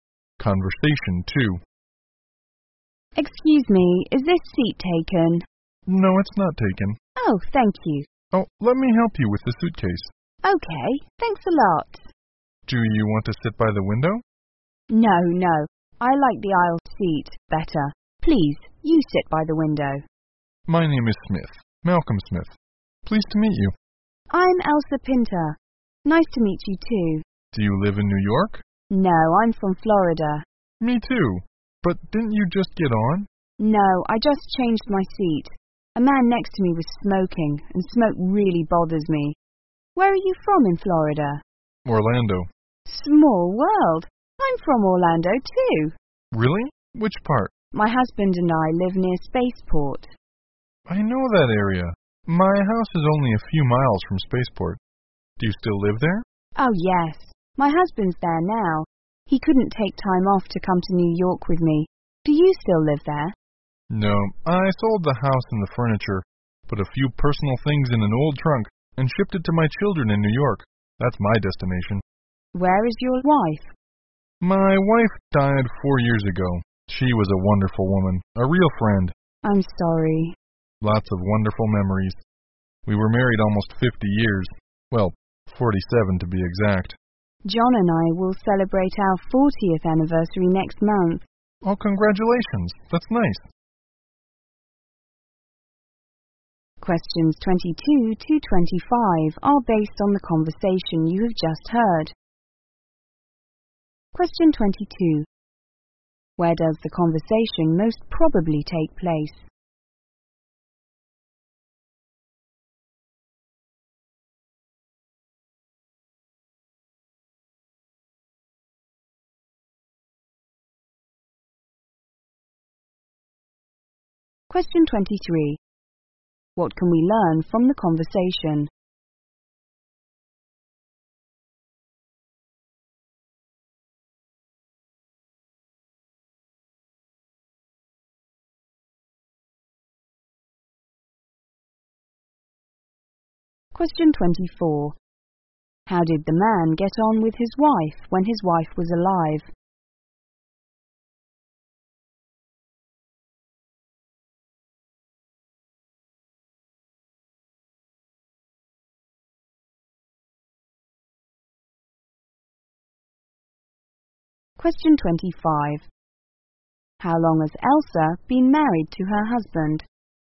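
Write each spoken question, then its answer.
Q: How did the man get on with his wife when his wife was alive?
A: Very well; she was a wonderful woman and a real friend

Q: How long has Elsa been married to her husband?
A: Almost 40 years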